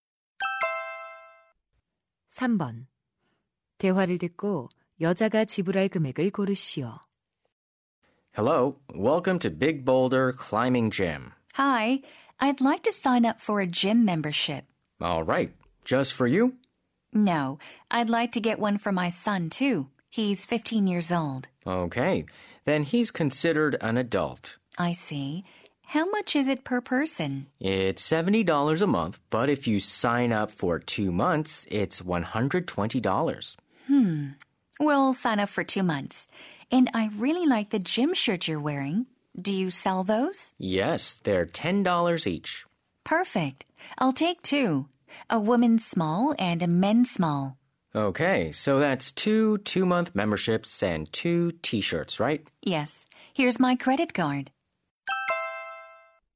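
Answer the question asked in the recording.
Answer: $260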